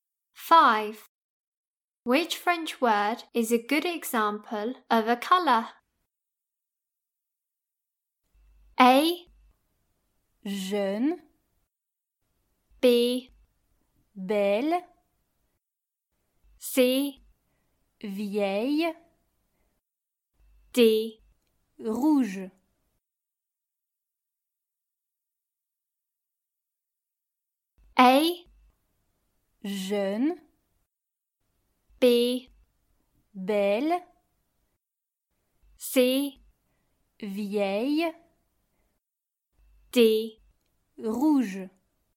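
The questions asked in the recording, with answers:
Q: Which French word is a good example of a color?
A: D: Rouge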